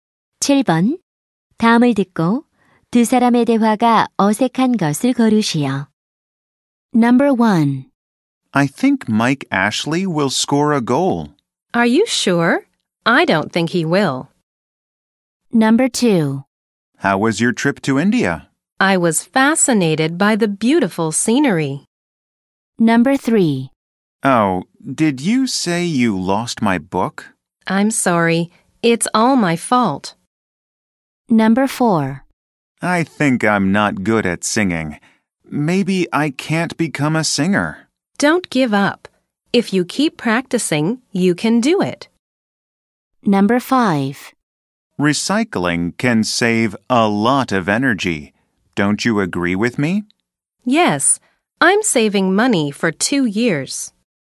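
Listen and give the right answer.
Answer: 5: Recycling can save a lot of energy. Don't you agree with me? / Yes, I'm saving money for 2 years.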